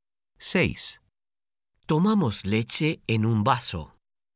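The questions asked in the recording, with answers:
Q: Tomamos leche en un vaso.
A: Sí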